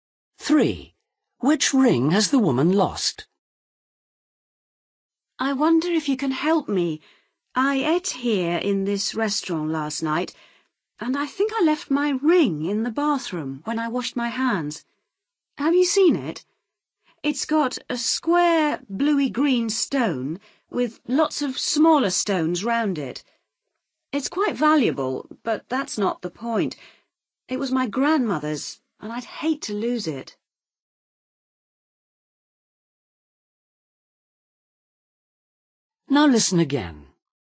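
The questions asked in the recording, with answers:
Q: Which ring has the woman lost?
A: a ring with a square bluey-green stone surrounded by smaller stones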